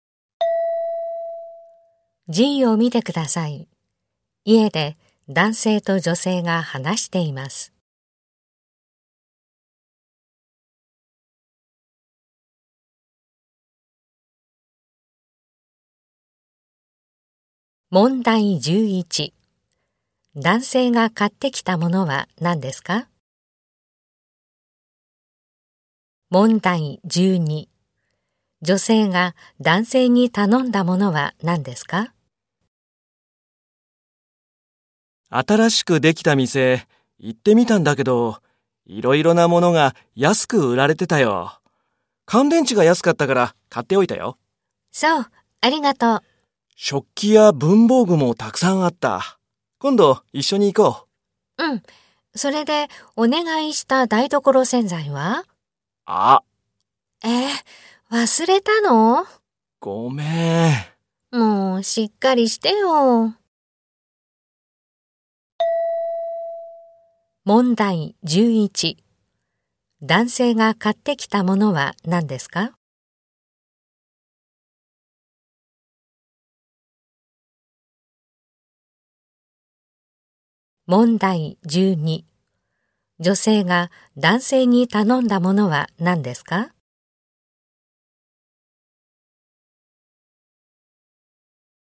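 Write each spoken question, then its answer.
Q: 男性が買ってきたものは何ですか?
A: 乾電池

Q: 女性が男性に頼んだものは何ですか?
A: 台所洗剤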